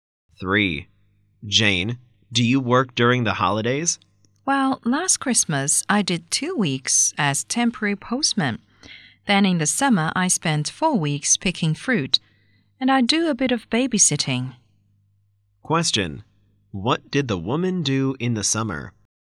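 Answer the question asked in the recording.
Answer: She picked fruit for 4 weeks.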